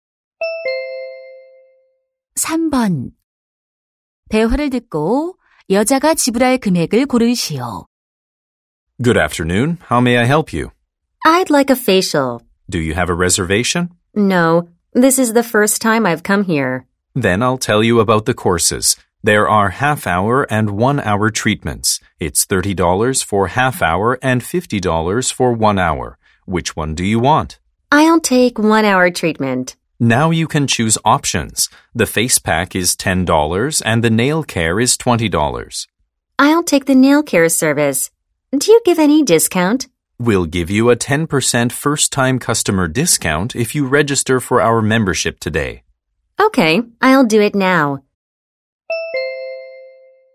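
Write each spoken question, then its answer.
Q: 대화를 듣고 여자가 지불할 금액을 고르시오.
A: $63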